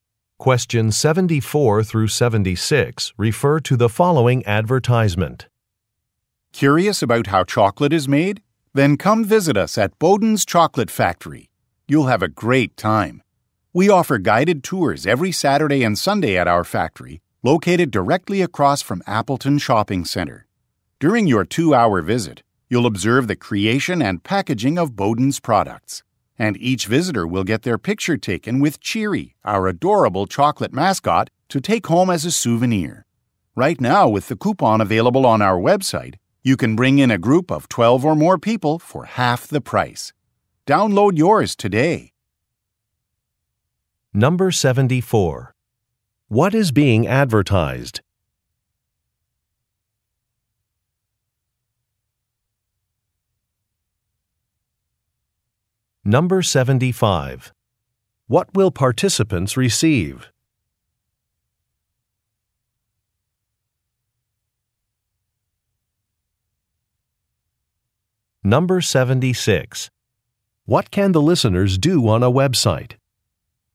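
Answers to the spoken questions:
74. Guided tours of Bowden's Chocolate Factory
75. A photo of themselves with the mascot Cheery, as a souvenir
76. Download a coupon for a group discount (half price for 12 or more people)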